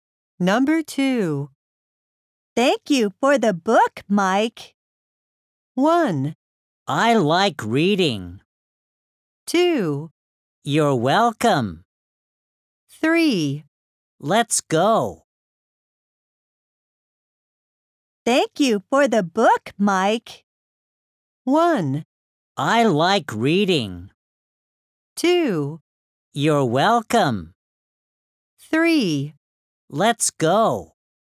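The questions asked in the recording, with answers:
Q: Thank you for the book, Mike.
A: 2: You're welcome.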